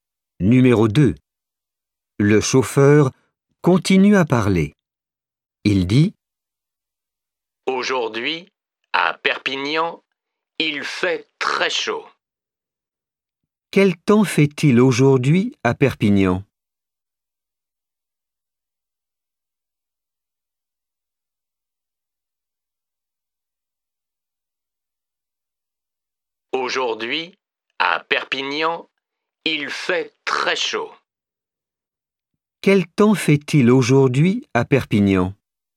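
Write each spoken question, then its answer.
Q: Quel temps fait-il aujourd'hui à Perpignan?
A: Il fait très chaud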